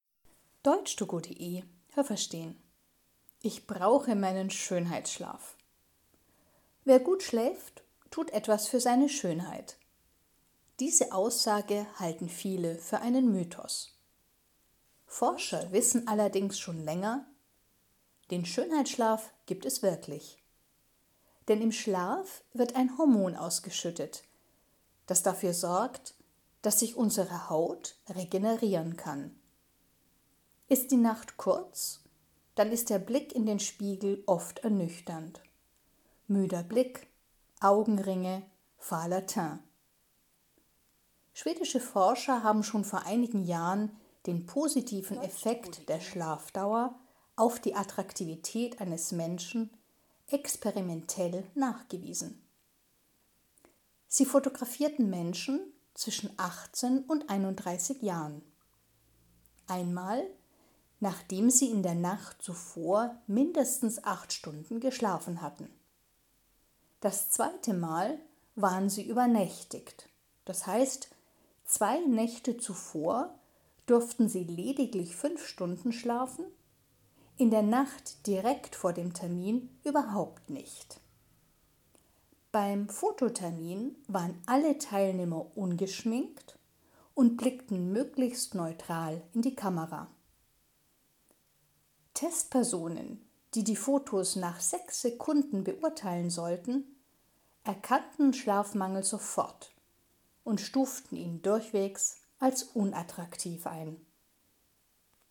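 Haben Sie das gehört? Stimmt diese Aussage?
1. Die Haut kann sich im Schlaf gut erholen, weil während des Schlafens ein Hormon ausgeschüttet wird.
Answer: richtig

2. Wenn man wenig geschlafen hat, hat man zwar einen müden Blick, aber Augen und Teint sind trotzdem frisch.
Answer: falsch

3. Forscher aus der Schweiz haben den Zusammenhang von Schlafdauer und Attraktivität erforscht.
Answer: falsch

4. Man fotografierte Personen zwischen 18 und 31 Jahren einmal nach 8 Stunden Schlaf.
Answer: richtig

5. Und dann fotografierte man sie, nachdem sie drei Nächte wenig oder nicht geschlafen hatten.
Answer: richtig

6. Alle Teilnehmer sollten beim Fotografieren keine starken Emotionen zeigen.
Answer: richtig

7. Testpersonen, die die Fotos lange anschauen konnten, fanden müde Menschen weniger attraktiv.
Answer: falsch

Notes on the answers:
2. Augen und Teint sehen auch müde aus.
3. Das waren schwedische Forscher.
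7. Die Testpersonen hatten diesen Eindruck bereits nach sechs Sekunden.

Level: Hörtexte B (mittel)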